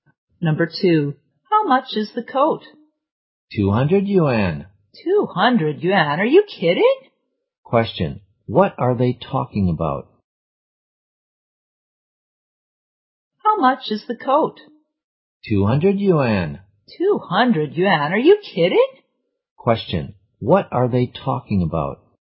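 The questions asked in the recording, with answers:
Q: what are they talking about?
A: The price of the coat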